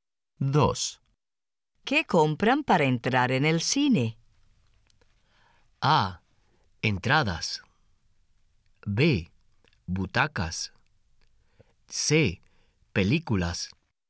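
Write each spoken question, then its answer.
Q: ¿Qué compran para entrar en el cine?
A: A: Entradas.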